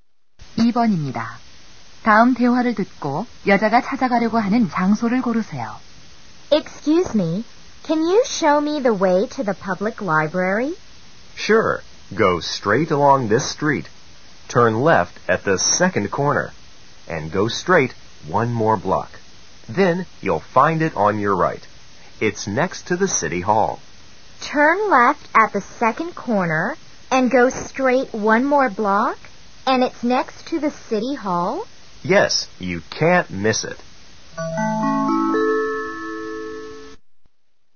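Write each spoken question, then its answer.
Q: 다음 대화를 듣고 여자가 찾아가려고 하는 장소를 고르세요.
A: 공공 도서관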